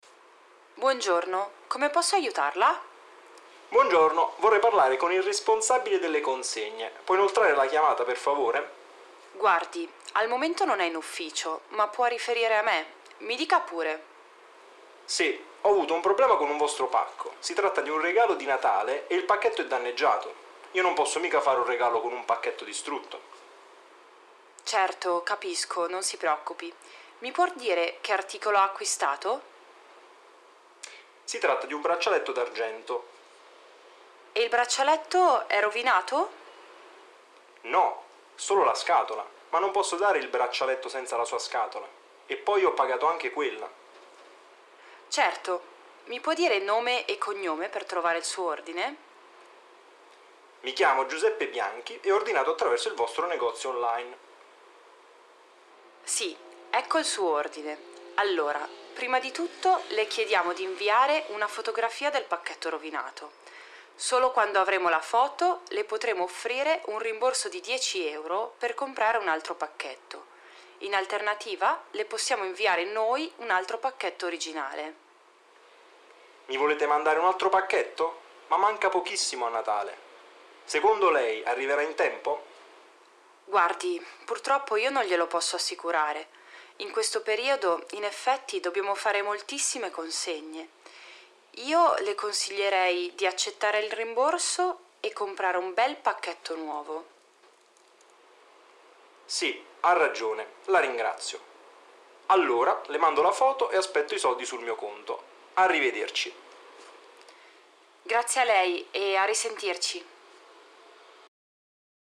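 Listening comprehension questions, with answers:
15. Hören Sie den Dialog mehrmals zu und antworten Sie auf die Fragen mit vero oder falso.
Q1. Il signor Bianchi vuole che l'assistente gli passi il responsabile.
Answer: vero

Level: B1.3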